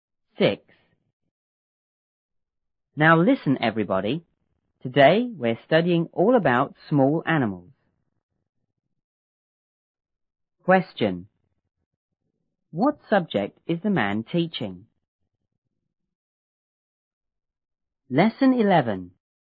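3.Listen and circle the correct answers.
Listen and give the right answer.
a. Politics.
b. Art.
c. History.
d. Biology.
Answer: d. Biology.

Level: 初中英语广州版1B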